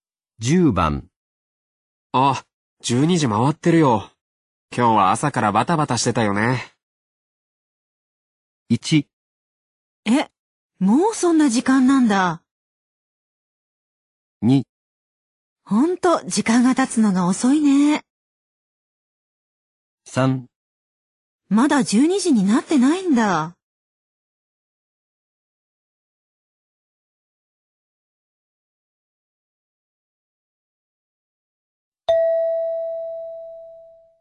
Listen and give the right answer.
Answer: 1

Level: N2 Listening · Test 12